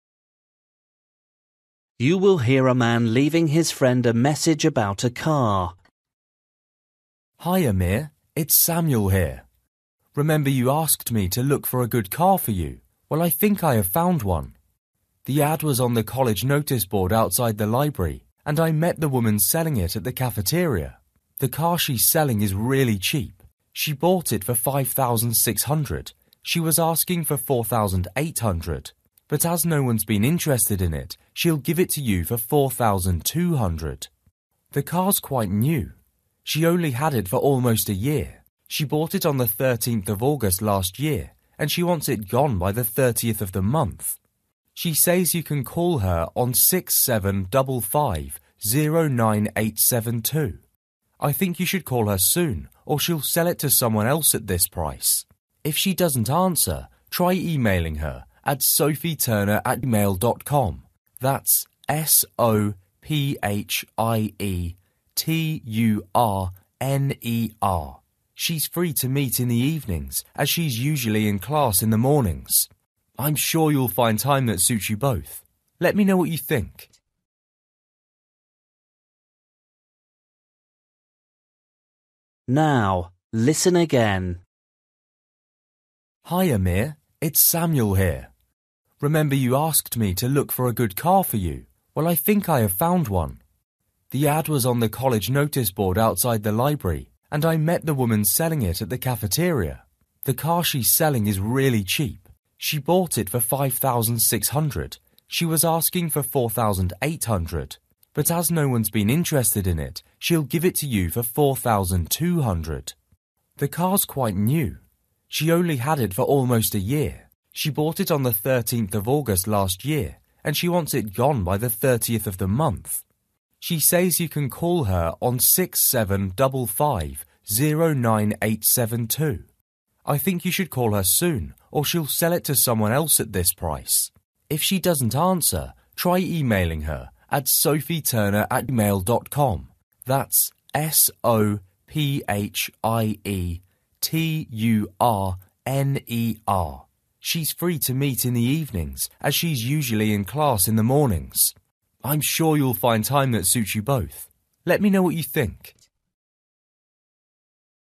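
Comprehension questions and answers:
For each question, write the correct answer in the gap. Write one word or a number or a date or a time.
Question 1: Price: (1) £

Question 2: Bought: (2) 13th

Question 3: Phone number: (3)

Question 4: Email address: (4) @mail.com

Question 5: When to meet: (5)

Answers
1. 4,200
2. August
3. 6755-09872
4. sophieturner
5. evenings

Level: Luyện nghe trình độ A2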